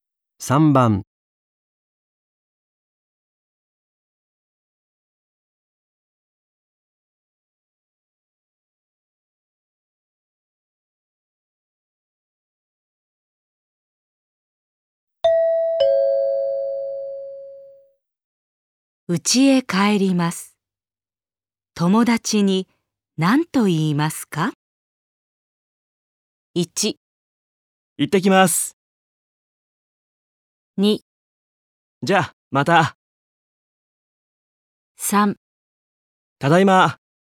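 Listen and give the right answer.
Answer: 2: じゃあ、また。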